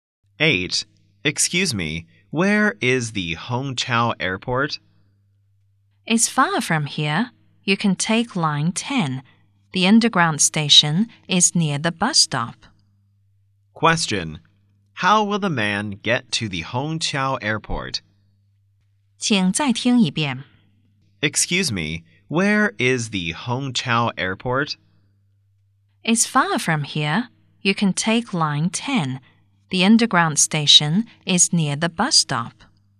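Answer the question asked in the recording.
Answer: By underground (Line 10)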